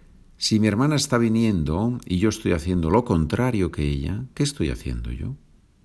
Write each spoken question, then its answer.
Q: Si mi hermana está viniendo y yo estoy haciendo lo contrario que ella, ¿qué estoy haciendo yo?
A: Estoy yendo.